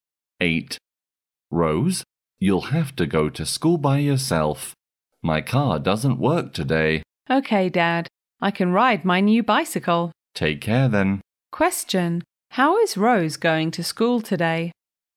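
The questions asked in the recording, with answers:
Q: How is Rose going to school today?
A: By bicycle.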